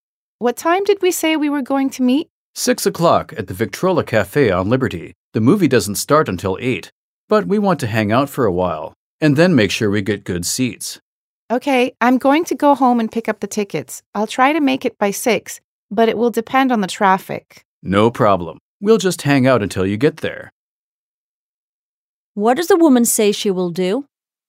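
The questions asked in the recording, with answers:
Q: What does the woman say she will do?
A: Go home and pick up the tickets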